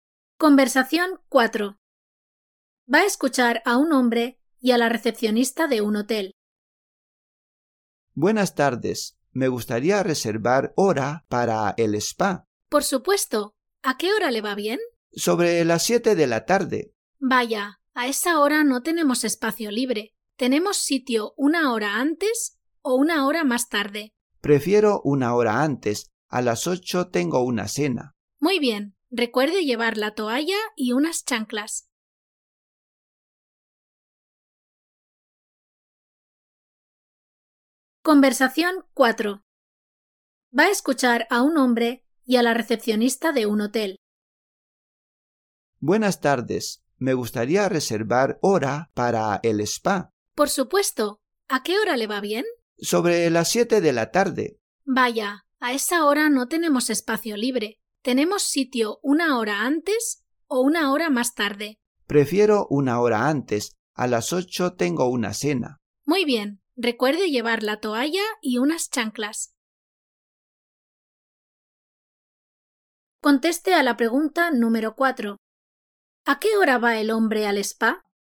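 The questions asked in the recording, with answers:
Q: ¿A qué hora va el hombre al spa?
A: A las 6 de la tarde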